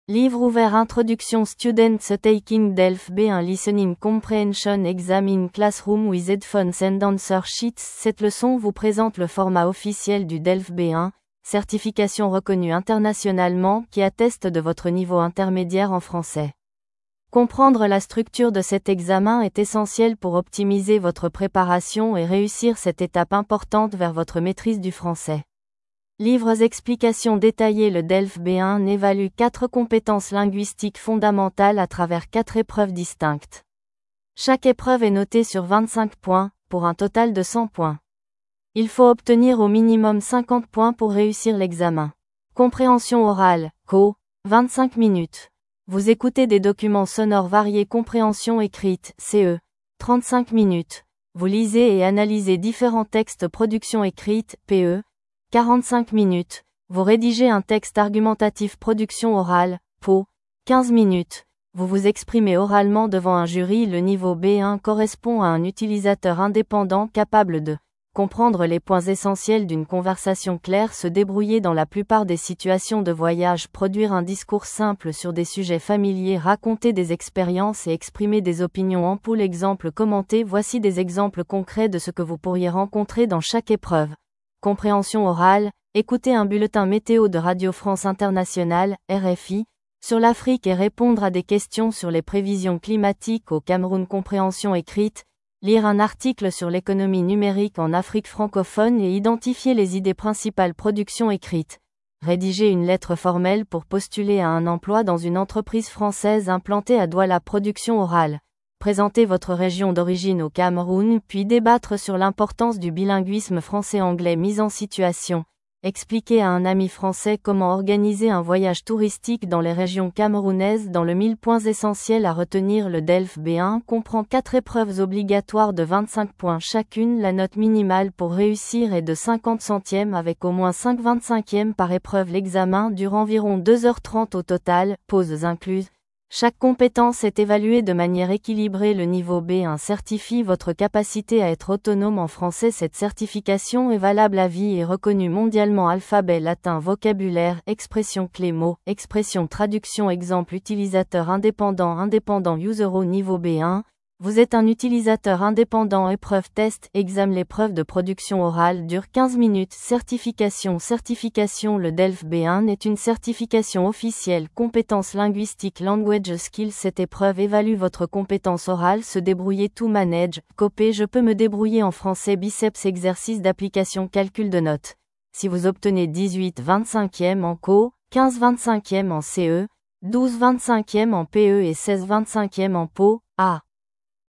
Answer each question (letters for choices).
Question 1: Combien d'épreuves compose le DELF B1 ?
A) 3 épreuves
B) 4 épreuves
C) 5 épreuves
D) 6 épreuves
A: B

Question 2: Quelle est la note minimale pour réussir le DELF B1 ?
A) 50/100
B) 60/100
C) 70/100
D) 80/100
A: A

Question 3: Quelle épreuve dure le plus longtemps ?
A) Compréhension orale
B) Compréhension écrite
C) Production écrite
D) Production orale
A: C

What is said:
📖 Introduction
Students taking DELF B1 listening comprehension exam in classroom with headphones and answer sheets
Cette leçon vous présente le format officiel du DELF B1, certification reconnue internationalement qui atteste de votre niveau intermédiaire en français. Comprendre la structure de cet examen est essentiel pour optimiser votre préparation et réussir cette étape importante vers votre maîtrise du français.
📚 Explications détaillées
Le DELF B1 évalue quatre compétences linguistiques fondamentales à travers quatre épreuves distinctes. Chaque épreuve est notée sur 25 points, pour un total de 100 points. Il faut obtenir au minimum 50 points pour réussir l'examen.
Compréhension orale (CO) : 25 minutes - Vous écoutez des documents sonores variés
Compréhension écrite (CE) : 35 minutes - Vous lisez et analysez différents textes
Production écrite (PE) : 45 minutes - Vous rédigez un texte argumentatif
Production orale (PO) : 15 minutes - Vous vous exprimez oralement devant un jury
Le niveau B1 correspond à un utilisateur indépendant capable de :
Comprendre les points essentiels d'une conversation claire
Se débrouiller dans la plupart des situations de voyage
Produire un discours simple sur des sujets familiers
Raconter des expériences et exprimer des opinions
Voici des exemples concrets de ce que vous pourriez rencontrer dans chaque épreuve :
Compréhension orale : Écouter un bulletin météo de Radio France Internationale (RFI) sur l'Afrique et répondre à des questions sur les prévisions climatiques au Cameroun
Compréhension écrite : Lire un article sur l'économie numérique en Afrique francophone et identifier les idées principales
Production écrite : Rédiger une lettre formelle pour postuler à un emploi dans une entreprise française implantée à Douala
Production orale : Présenter votre région d'origine au Cameroun puis débattre sur l'importance du bilinguisme français-anglais
Mise en situation : Expliquer à un ami français comment organiser un voyage touristique dans les régions camerounaises
🎯 Points essentiels à retenir
Le DELF B1 comprend 4 épreuves obligatoires de 25 points chacune
La note minimale pour réussir est de 50/100 avec au moins 5/25 par épreuve
L'examen dure environ 2h30 au total (pauses incluses)
Chaque compétence est évaluée de manière équilibrée
Le niveau B1 certifie votre capacité à être autonome en français
Cette certification est valable à vie et reconnue mondialement
Traduction
Exemple
Utilisateur indépendant
Au niveau B1, vous êtes un utilisateur indépendant
Épreuve
Test/Exam
L'épreuve de production orale dure 15 minutes
Certification
Certification
Le DELF B1 est une certification officielle
Compétence linguistique
Cette épreuve évalue votre compétence orale
Se débrouiller
To manage/cope
Je peux me débrouiller en français